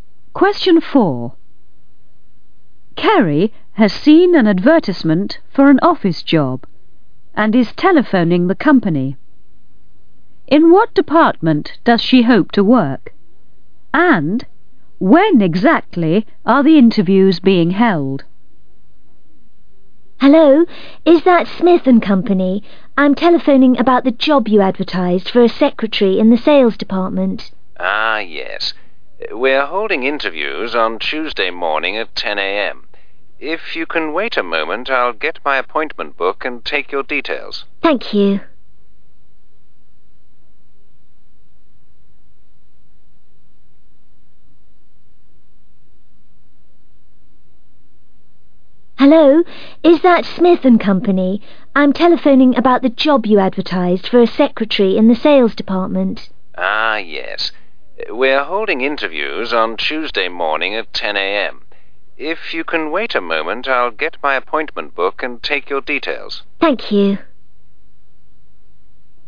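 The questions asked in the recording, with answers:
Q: In what department does she hope to work?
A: The sales department

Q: And when exactly are the interviews being held?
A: Tuesday morning at 10 a.m.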